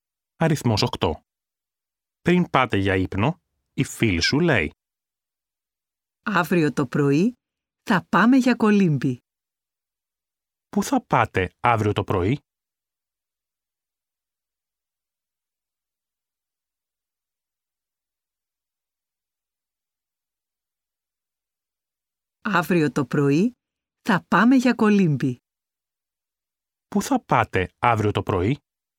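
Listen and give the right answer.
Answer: Για κολύμπι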